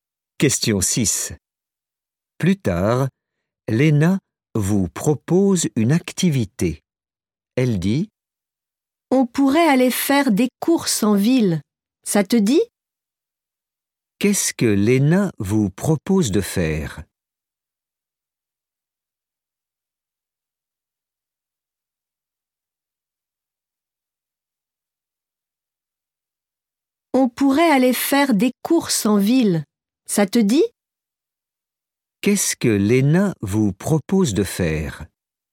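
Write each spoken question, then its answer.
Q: Qu'est-ce que Léna vous propose de faire?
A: faire des courses en ville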